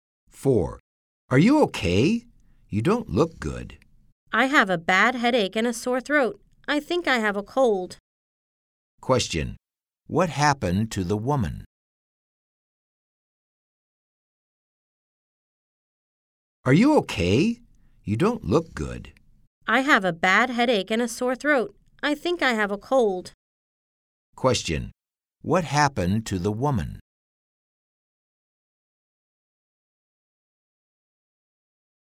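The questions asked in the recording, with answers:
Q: what happened to the woman?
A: She has a cold, with a bad headache and a sore throat.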